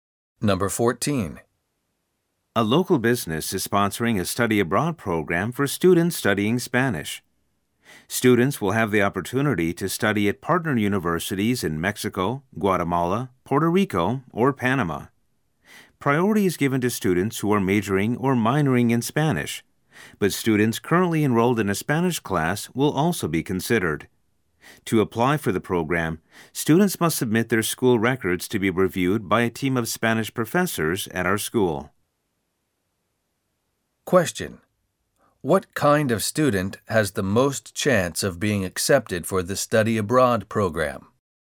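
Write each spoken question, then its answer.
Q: What kind of student has the most chance of being accepted for the study abroad program?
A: A student majoring or minoring in Spanish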